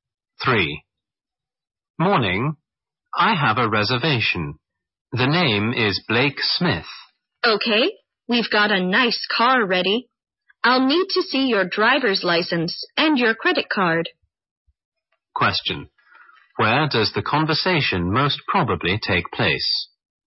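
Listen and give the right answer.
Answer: At a car rental office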